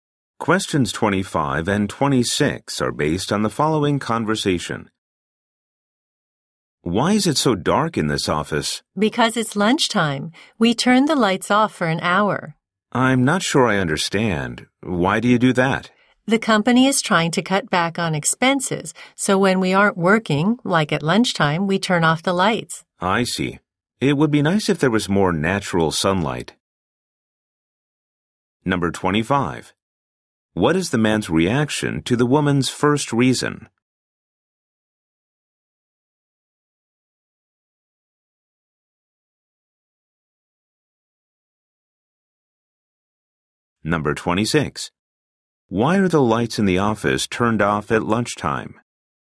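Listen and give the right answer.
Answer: To cut back on expenses.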